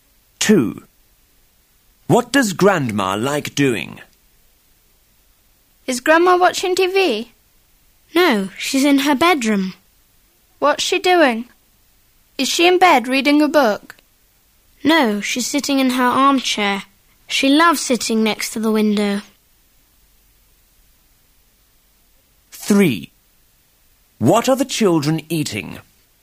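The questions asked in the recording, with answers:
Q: What does Grandma like doing?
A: Sitting in her armchair next to the window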